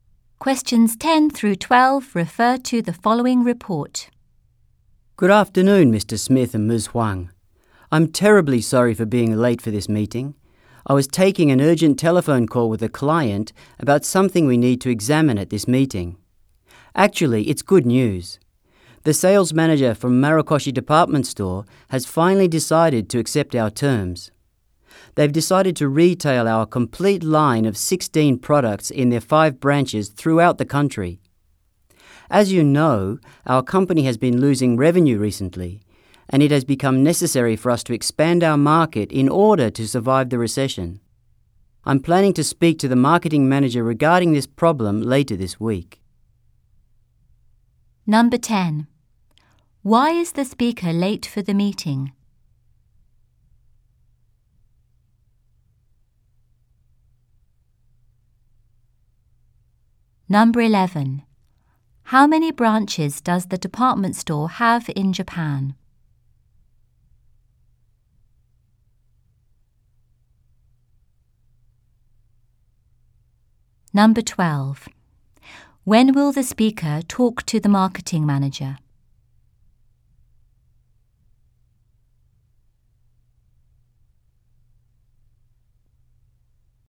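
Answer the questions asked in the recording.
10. He was taking an urgent telephone call with a client.
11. Five
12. Later this week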